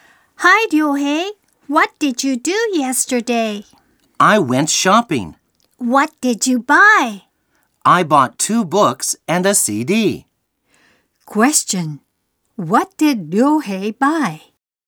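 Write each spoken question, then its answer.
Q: What did Ryohei buy?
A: Two books and a CD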